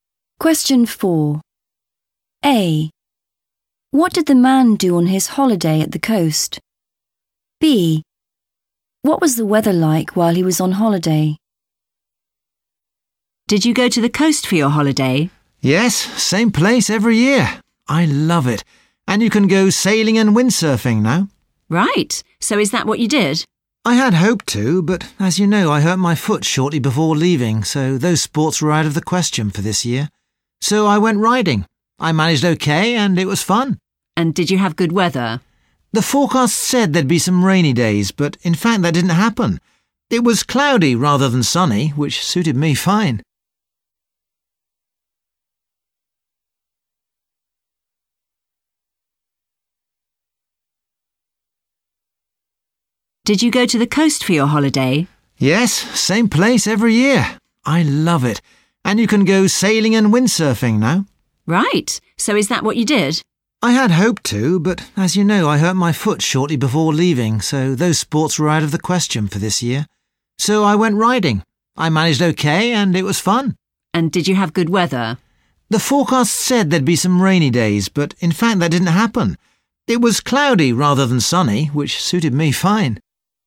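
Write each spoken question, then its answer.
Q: What did the man do on his holiday at the coast?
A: riding

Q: What was the weather like while he was on holiday?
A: cloudy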